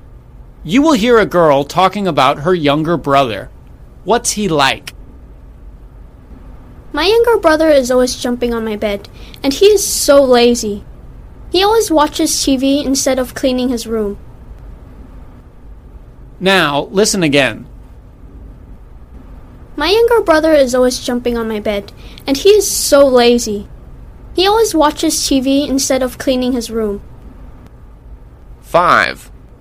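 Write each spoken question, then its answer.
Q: What's he like?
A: Lazy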